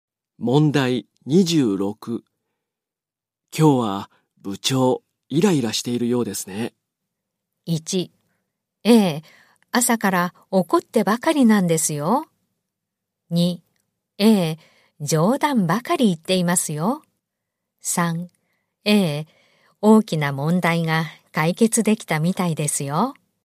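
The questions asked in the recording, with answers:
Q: 今日は部長、イライラしているようですね。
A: 1: ええ、朝から怒ってばかりなんですよ。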